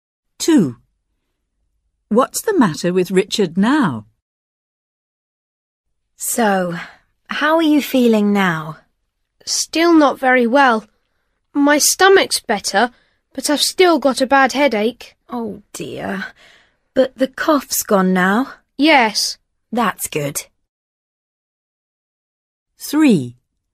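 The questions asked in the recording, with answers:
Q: What's the matter with Richard now?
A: He has a bad headache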